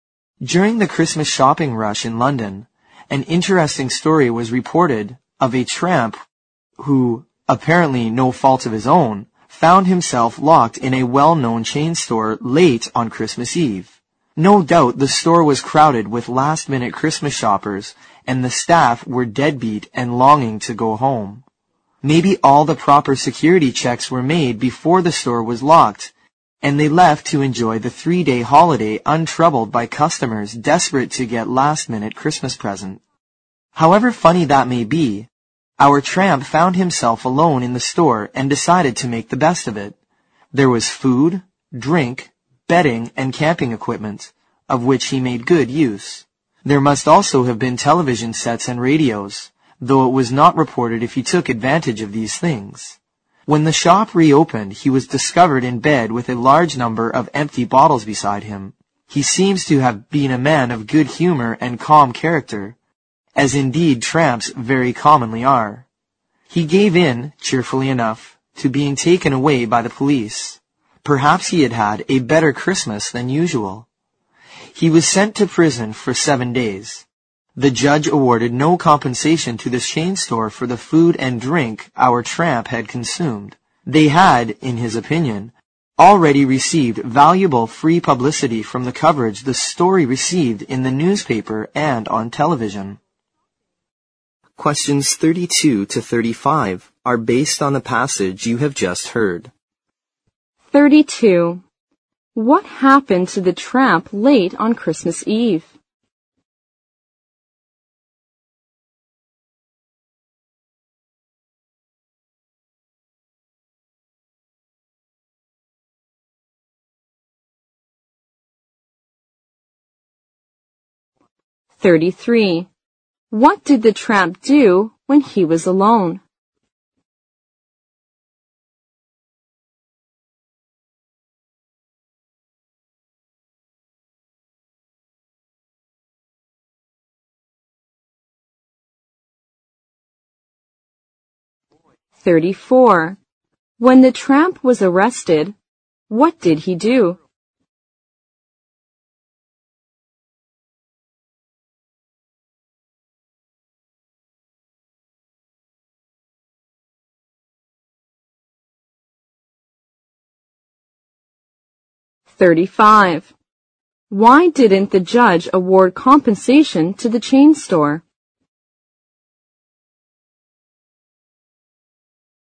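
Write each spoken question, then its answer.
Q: What happened to the tramp late on Christmas Eve?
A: He was accidentally locked in a well-known chain store.

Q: What did the tramp do when he was alone?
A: He made the best of it, using the store's food, drink, bedding and camping equipment.

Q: When the tramp was arrested, what did he do?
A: He cheerfully went with the police.

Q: Why didn't the judge award compensation to the chain store?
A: The store had already received valuable free publicity from the newspaper and TV coverage of the story.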